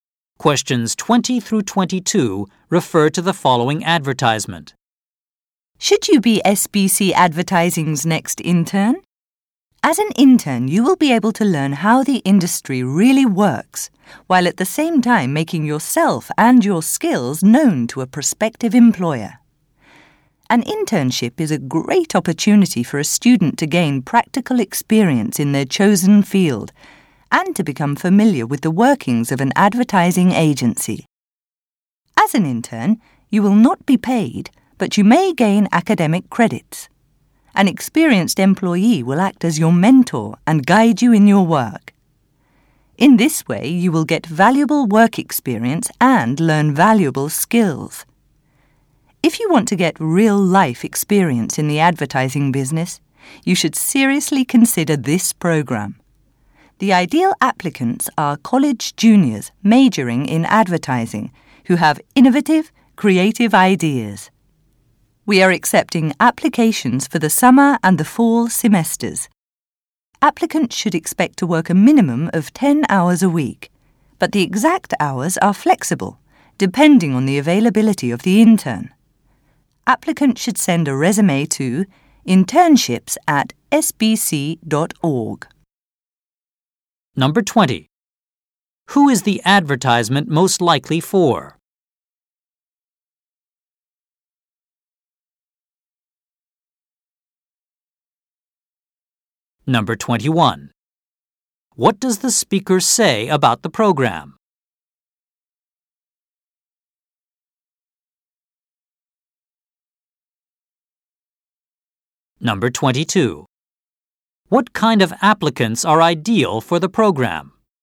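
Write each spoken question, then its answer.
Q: Who is the advertisement most likely for?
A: College students interested in advertising

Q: What kind of applicants are ideal for the program?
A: College juniors majoring in advertising with innovative, creative ideas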